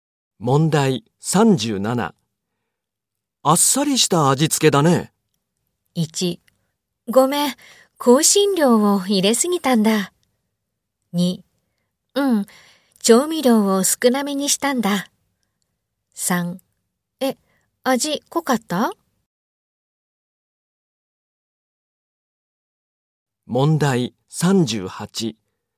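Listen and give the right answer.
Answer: 2: うん、調味料を少なめにしたんだ。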